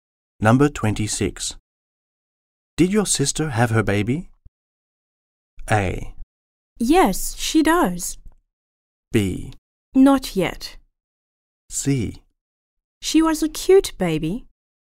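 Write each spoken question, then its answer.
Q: Did your sister have her baby?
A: B: Not yet.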